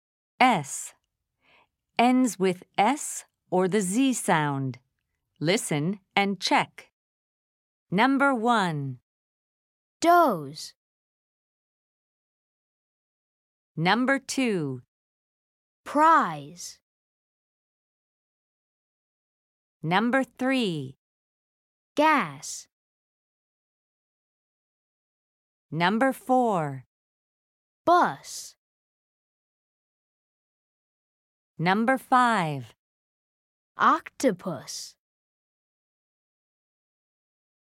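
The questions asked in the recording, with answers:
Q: Doze.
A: Z sound

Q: Prize.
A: Z sound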